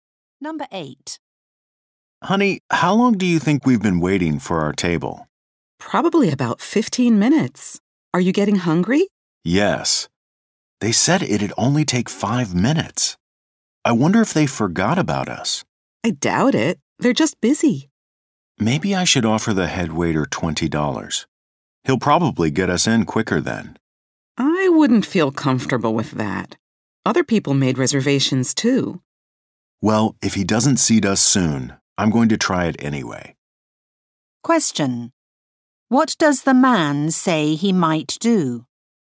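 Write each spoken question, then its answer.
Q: What does the man say he might do?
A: Offer the head waiter $20 to be seated sooner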